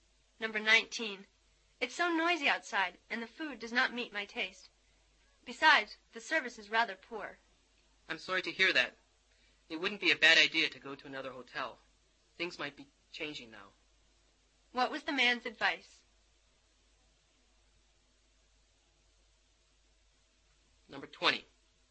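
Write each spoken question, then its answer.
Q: What was the man's advice?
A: Go to another hotel.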